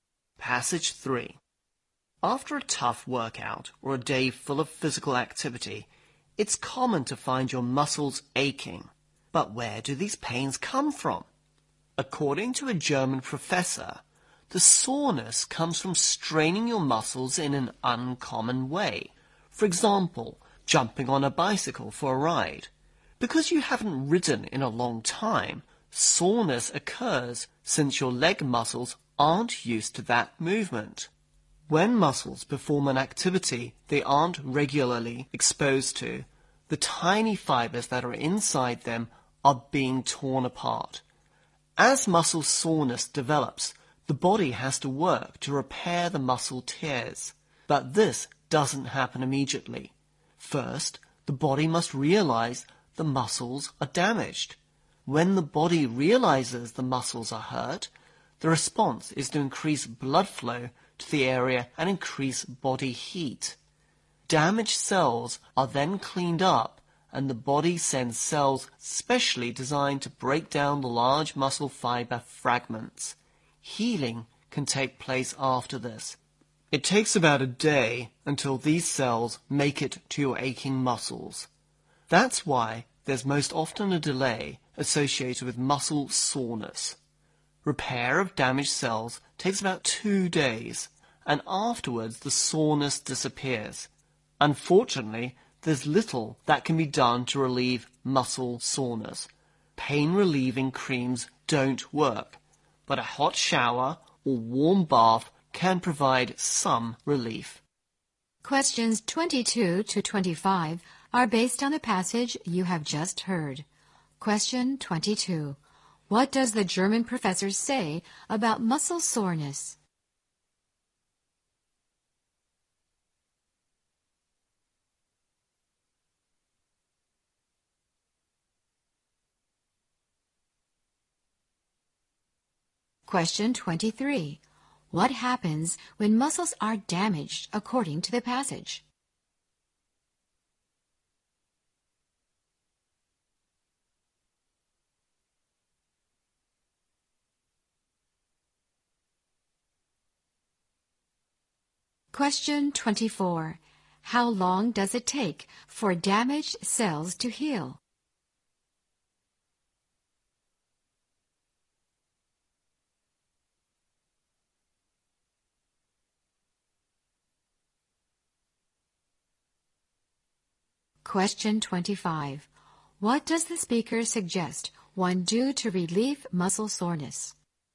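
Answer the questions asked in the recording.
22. It comes from straining muscles in an uncommon way
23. Blood flow to the area and body heat increase
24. About 2 days
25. Take a hot shower or warm bath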